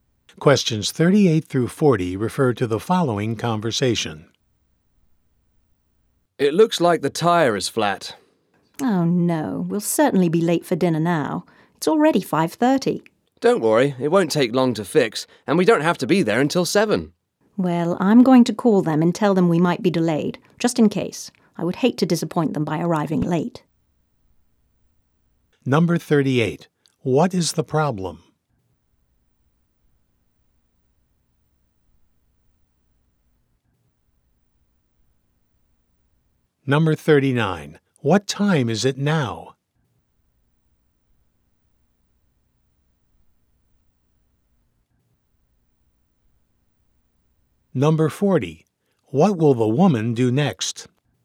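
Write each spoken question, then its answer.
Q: What is the problem?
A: A flat tire

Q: What time is it now?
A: 5:30

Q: What will the woman do next?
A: Call the dinner hosts to say they may be late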